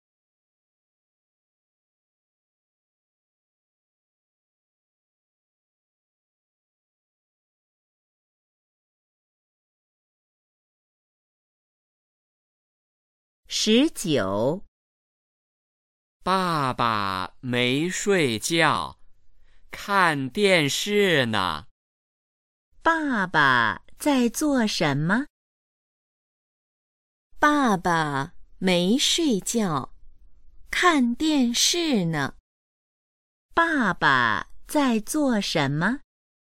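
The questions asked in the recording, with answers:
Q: 爸爸在做什么?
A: 看电视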